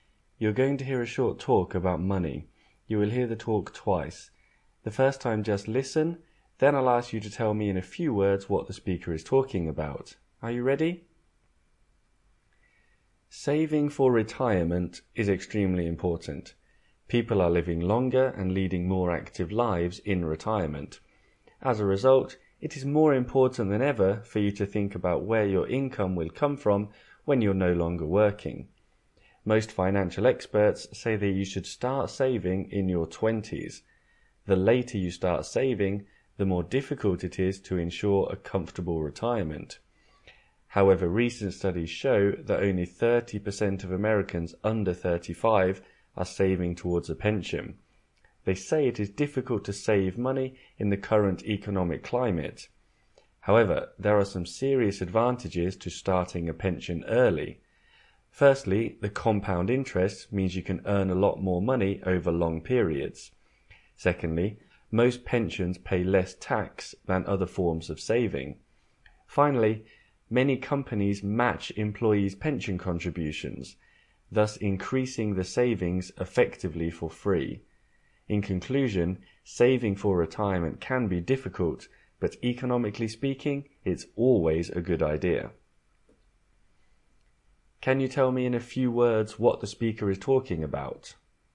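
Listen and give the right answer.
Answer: Saving for retirement (starting a pension early)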